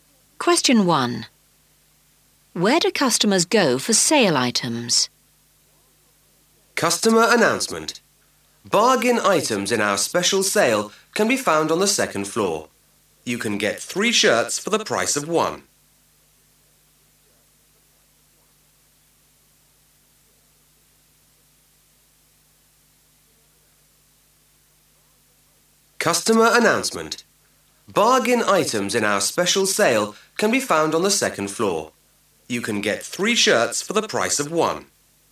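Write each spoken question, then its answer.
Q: Where do customers go for sale items?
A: The second floor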